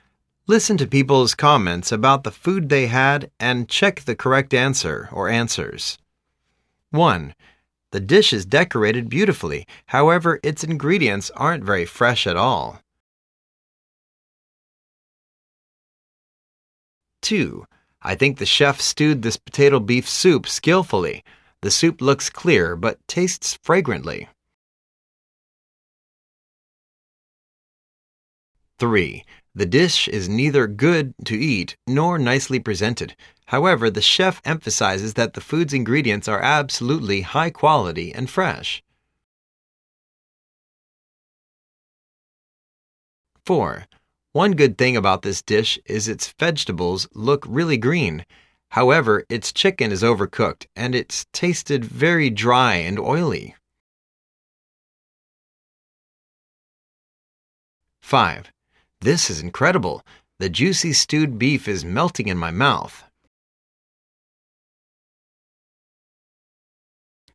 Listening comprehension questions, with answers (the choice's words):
Listen to people's comments about the food they had and check the correct answer/answers.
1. This dish is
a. not fresh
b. not eatable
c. beautiful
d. tender.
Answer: not fresh

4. In short the chef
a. made the vegetable looks great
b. spend too much time on cooking the chicken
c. didn't cook any chicken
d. has done something wrong on making the beef.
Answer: made the vegetable looks great

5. The beef is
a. hard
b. raw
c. stewed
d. very tender.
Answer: stewed

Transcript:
1.The dish is decorated beautifully however its ingredients aren't very fresh at all.
2.I think the chef stewed this potato beef soup skillfully.The soup looks clear but taste frag rantly.
3.The dish is neither good to eat nor nicely presented,however the chef emphasizes that the food's ingredients are absolutely high quality and fresh.
4.One good thing about this dish is its vegetable look really green. However, its chicken is overcooked as it's tasted very dry and oily.
5.This is incredible. The juicy stewed beef is melting in my mouth.